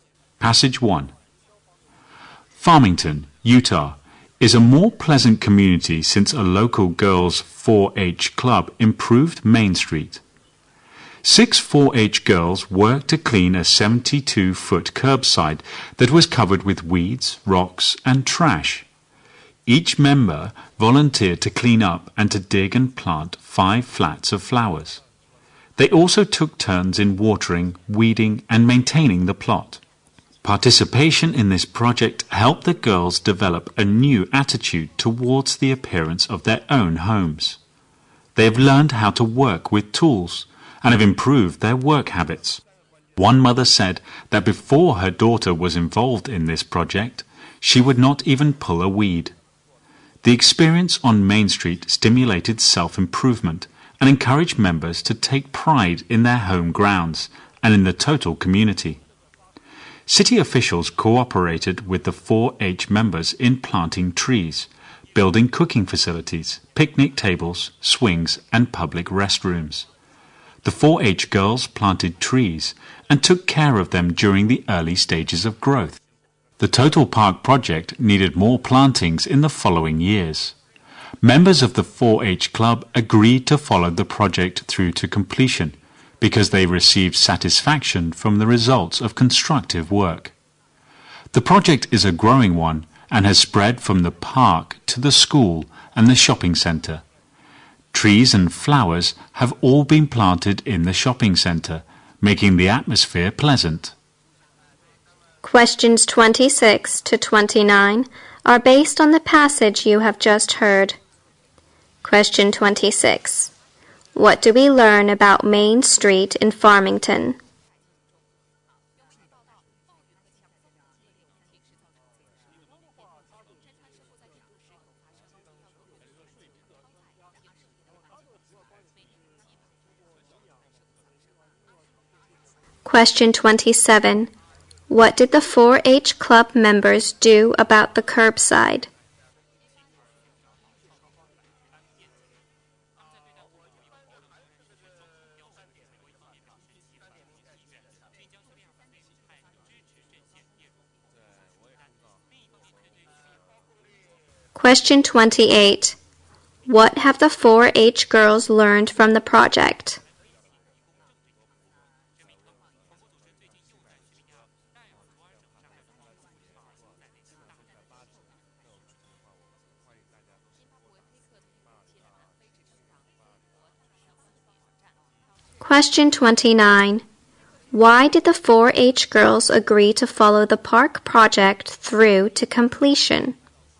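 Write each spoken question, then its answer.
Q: What do we learn about Main Street in Farmington?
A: A local girls' 4-H club improved it and made it more pleasant.

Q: What did the 4-H Club members do about the curbside?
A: They cleaned it up and planted flowers there.

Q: What have the 4-H girls learned from the project?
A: How to work with tools; they also improved their work habits.

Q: Why did the 4-H girls agree to follow the park project through to completion?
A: Constructive work gave them satisfaction.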